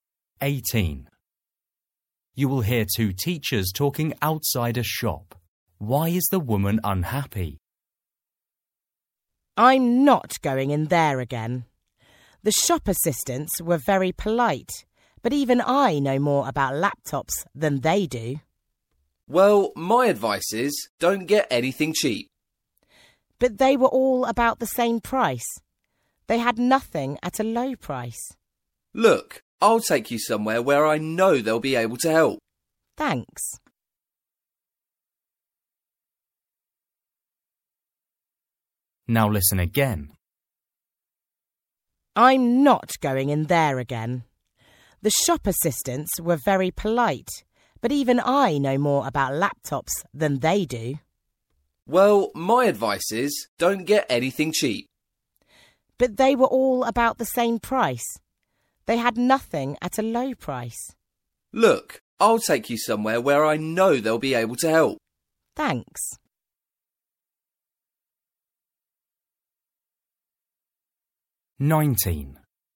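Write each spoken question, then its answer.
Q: Why is the woman unhappy?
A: the shop assistants didn't know much about laptops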